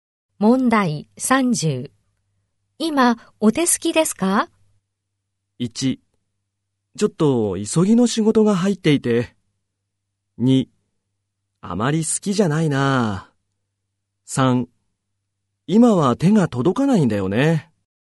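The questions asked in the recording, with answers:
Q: 今、お手すきですか?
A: 1: ちょっと急ぎの仕事が入っていて。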